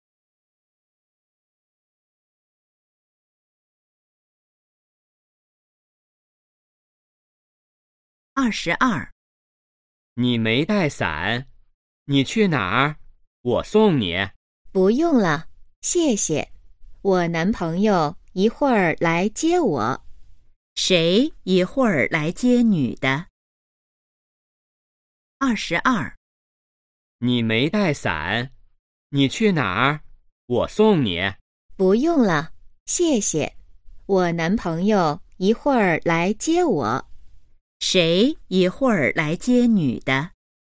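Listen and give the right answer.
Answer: 她男朋友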